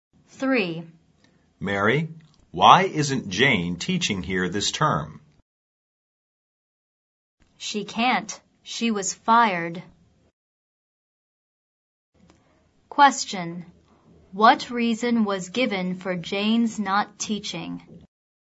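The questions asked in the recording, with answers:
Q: What reason was given for Jane's not teaching?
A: She was fired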